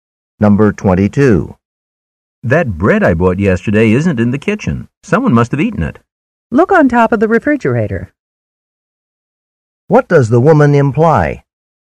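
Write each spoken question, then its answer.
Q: What does the woman imply?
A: The bread is on top of the refrigerator.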